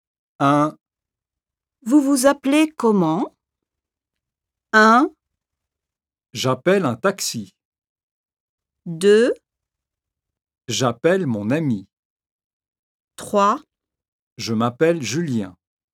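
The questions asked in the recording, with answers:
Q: Vous vous appelez comment?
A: 3: Je m'appelle Julien.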